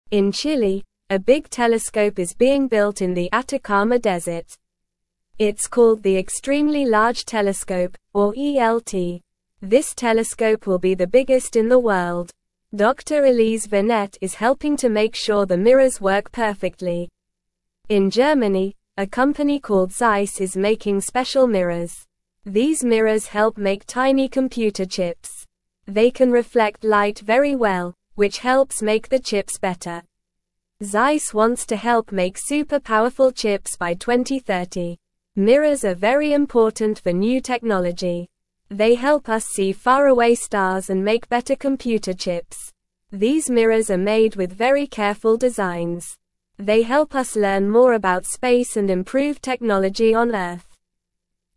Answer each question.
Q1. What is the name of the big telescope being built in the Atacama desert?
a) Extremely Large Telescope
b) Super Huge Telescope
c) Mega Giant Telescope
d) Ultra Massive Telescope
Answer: a

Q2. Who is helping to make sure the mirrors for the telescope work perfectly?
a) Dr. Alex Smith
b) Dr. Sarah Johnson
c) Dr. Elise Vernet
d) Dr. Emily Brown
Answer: c

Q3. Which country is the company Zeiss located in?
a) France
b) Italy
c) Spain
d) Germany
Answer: d

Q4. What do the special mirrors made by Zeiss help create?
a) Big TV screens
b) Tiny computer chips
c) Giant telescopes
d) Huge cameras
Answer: b

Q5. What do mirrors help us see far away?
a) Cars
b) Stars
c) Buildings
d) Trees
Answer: b

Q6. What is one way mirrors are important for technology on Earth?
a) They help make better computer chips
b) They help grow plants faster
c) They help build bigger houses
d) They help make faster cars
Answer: a

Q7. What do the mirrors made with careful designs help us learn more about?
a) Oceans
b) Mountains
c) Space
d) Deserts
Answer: c

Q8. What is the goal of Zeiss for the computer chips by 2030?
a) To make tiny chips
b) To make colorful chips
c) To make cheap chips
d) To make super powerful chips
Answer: d

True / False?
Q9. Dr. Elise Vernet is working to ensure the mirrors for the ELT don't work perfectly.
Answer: False

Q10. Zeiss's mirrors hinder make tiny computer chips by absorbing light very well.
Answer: False

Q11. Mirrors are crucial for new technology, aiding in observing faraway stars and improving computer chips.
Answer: True

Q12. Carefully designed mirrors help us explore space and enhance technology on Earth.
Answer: True

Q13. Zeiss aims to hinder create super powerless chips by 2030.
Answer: False

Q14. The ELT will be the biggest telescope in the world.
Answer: True

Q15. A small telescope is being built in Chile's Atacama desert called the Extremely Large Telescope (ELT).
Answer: False

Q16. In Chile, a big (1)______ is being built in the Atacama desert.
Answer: telescope

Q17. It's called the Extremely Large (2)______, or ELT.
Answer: Telescope

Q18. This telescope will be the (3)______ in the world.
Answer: biggest

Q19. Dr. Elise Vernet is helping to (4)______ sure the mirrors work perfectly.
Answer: make

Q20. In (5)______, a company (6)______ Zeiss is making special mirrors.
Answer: Germany

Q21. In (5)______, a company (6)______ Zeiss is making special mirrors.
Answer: called

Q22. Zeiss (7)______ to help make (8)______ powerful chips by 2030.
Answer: wants

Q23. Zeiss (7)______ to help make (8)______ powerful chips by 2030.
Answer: super

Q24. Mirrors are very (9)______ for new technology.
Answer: important

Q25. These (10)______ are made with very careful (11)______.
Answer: mirrors

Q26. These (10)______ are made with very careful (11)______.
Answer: designs

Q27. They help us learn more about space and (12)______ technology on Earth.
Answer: improve

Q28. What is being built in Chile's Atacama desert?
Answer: A big telescope is being built in Chile's Atacama desert.

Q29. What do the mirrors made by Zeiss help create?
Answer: The mirrors made by Zeiss help create tiny computer chips.

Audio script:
In Chile, a big telescope is being built in the Atacama desert. It's called the Extremely Large Telescope, or ELT. This telescope will be the biggest in the world. Dr. Elise Vernet is helping to make sure the mirrors work perfectly.
In Germany, a company called Zeiss is making special mirrors. These mirrors help make tiny computer chips. They can reflect light very well, which helps make the chips better. Zeiss wants to help make super powerful chips by 2030.
Mirrors are very important for new technology. They help us see faraway stars and make better computer chips. These mirrors are made with very careful designs. They help us learn more about space and improve technology on Earth.

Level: Level 2

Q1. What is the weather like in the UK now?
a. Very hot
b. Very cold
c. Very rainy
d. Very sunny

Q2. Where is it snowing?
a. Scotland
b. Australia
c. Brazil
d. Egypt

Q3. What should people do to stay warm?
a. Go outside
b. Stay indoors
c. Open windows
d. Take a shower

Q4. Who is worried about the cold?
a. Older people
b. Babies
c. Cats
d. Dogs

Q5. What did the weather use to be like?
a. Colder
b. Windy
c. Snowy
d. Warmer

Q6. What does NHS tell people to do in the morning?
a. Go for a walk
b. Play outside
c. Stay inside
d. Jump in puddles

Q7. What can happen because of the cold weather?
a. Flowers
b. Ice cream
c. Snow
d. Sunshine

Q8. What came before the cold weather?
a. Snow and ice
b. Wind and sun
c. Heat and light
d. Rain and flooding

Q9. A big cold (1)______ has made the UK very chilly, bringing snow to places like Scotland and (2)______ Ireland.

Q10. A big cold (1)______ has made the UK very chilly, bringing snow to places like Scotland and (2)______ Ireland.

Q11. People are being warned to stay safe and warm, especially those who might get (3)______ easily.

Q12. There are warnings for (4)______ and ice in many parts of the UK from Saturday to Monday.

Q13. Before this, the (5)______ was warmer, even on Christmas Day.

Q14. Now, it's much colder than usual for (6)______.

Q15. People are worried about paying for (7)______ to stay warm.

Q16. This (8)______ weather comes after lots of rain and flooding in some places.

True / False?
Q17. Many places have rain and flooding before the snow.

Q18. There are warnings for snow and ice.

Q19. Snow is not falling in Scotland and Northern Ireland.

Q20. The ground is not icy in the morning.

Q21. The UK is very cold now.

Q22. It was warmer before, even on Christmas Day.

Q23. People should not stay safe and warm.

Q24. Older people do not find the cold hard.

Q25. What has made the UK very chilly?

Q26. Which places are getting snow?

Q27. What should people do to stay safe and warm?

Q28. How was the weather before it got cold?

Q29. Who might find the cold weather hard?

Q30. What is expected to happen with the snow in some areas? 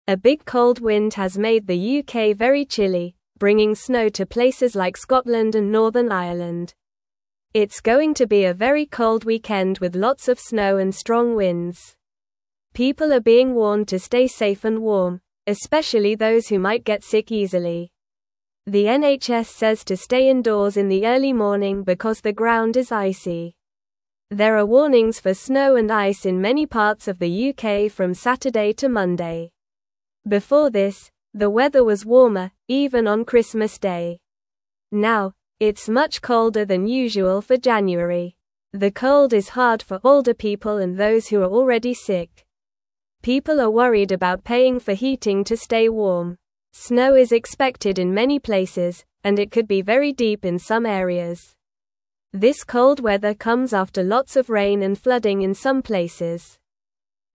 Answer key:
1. b
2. a
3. b
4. a
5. d
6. c
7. c
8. d
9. wind
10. Northern
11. sick
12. snow
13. weather
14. January
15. heating
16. cold
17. True
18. True
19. False
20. False
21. True
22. True
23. False
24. False
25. A big cold wind has made the UK very chilly.
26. Places like Scotland and Northern Ireland are getting snow.
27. People should stay indoors and keep warm.
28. The weather was warmer before it got cold.
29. Older people and those who are already sick might find the cold hard.
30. Snow is expected to be very deep in some areas.

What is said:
A big cold wind has made the UK very chilly, bringing snow to places like Scotland and Northern Ireland. It's going to be a very cold weekend with lots of snow and strong winds. People are being warned to stay safe and warm, especially those who might get sick easily. The NHS says to stay indoors in the early morning because the ground is icy. There are warnings for snow and ice in many parts of the UK from Saturday to Monday.
Before this, the weather was warmer, even on Christmas Day. Now, it's much colder than usual for January. The cold is hard for older people and those who are already sick. People are worried about paying for heating to stay warm. Snow is expected in many places, and it could be very deep in some areas. This cold weather comes after lots of rain and flooding in some places.

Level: Level 1

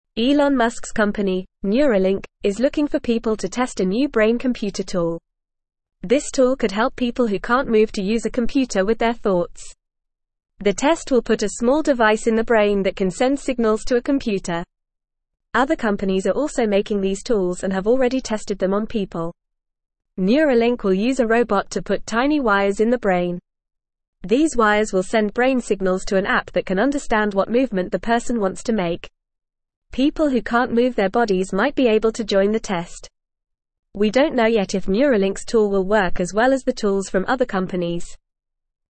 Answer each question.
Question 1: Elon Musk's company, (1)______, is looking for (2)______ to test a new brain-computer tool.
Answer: Neuralink

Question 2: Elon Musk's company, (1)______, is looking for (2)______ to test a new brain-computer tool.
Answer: people

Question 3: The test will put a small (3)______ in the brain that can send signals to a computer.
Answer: device

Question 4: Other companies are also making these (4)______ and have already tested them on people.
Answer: tools

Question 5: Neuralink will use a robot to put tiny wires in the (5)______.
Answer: brain

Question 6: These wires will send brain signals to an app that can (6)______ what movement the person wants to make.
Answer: understand

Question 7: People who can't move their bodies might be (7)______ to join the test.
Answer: able

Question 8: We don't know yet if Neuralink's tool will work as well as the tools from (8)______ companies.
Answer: other

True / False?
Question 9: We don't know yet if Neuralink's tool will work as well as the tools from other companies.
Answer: True

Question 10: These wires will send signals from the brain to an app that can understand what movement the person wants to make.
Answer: True

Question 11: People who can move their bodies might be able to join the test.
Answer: False

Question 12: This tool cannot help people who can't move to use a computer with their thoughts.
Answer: False

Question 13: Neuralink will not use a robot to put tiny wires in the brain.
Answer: False

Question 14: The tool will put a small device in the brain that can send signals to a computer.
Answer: True

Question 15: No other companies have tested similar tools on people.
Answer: False

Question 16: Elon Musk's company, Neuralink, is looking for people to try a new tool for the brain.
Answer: True

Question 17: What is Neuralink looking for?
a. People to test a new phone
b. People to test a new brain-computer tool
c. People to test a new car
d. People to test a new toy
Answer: b

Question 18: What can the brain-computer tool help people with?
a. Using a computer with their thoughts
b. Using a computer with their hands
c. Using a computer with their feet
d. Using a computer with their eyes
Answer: a

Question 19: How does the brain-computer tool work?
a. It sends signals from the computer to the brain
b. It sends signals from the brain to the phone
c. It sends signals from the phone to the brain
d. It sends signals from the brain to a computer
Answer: d

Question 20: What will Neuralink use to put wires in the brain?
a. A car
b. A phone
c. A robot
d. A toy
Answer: c

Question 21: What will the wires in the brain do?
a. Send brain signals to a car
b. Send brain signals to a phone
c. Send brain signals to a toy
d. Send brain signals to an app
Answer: d

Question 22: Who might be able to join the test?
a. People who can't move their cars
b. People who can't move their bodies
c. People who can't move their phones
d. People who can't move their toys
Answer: b

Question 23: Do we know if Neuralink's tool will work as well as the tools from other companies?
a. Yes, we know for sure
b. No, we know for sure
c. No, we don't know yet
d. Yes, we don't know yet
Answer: c

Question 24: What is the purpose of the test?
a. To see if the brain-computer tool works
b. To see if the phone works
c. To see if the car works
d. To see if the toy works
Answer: a

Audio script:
Elon Musk's company, Neuralink, is looking for people to test a new brain-computer tool. This tool could help people who can't move to use a computer with their thoughts. The test will put a small device in the brain that can send signals to a computer. Other companies are also making these tools and have already tested them on people.
Neuralink will use a robot to put tiny wires in the brain. These wires will send brain signals to an app that can understand what movement the person wants to make. People who can't move their bodies might be able to join the test.

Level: Level 1

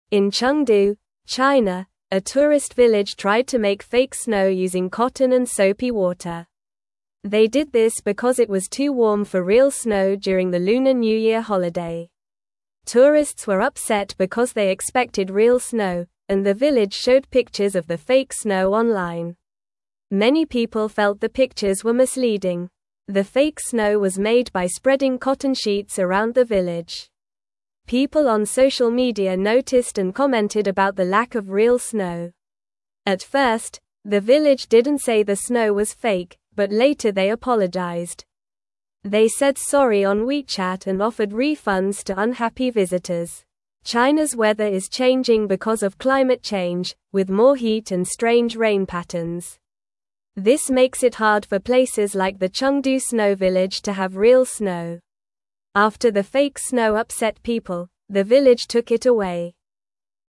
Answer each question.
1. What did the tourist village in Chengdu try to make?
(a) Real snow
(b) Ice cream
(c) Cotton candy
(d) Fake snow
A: d

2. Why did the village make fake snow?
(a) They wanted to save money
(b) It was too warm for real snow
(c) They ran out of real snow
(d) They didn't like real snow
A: b

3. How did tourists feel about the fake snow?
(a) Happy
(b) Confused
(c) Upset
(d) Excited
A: c

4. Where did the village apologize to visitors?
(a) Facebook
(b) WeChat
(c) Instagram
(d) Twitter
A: b

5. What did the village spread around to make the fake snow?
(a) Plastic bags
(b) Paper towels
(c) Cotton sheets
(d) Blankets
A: c

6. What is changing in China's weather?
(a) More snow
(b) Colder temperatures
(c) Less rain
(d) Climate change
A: d

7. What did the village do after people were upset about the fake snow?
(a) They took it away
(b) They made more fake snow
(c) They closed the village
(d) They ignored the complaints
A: a

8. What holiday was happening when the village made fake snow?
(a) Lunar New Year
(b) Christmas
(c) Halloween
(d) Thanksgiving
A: a

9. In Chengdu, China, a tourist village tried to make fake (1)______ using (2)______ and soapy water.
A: snow

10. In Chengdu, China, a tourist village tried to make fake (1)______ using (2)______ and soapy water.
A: cotton

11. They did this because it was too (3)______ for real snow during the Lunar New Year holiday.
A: warm

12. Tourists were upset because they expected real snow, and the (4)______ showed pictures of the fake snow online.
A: village

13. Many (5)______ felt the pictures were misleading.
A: people

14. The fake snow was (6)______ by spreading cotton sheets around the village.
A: made

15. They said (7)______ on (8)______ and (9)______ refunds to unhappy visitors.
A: sorry

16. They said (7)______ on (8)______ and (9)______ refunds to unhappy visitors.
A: WeChat

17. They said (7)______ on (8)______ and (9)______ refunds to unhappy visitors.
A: offered

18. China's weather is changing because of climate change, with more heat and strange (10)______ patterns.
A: rain

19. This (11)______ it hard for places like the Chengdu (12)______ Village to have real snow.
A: makes

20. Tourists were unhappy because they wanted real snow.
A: True

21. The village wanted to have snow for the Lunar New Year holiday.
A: True

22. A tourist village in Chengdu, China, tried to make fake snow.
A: True

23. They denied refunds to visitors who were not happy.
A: False

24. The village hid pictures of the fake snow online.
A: False

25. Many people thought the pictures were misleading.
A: True

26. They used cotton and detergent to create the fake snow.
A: False

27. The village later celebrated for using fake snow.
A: False

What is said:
In Chengdu, China, a tourist village tried to make fake snow using cotton and soapy water. They did this because it was too warm for real snow during the Lunar New Year holiday. Tourists were upset because they expected real snow, and the village showed pictures of the fake snow online. Many people felt the pictures were misleading.
The fake snow was made by spreading cotton sheets around the village. People on social media noticed and commented about the lack of real snow. At first, the village didn't say the snow was fake, but later they apologized. They said sorry on WeChat and offered refunds to unhappy visitors.
China's weather is changing because of climate change, with more heat and strange rain patterns. This makes it hard for places like the Chengdu Snow Village to have real snow. After the fake snow upset people, the village took it away.

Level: Level 2

